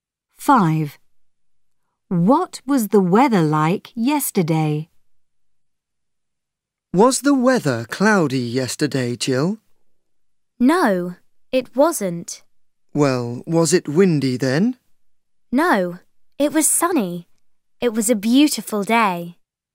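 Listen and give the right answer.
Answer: sunny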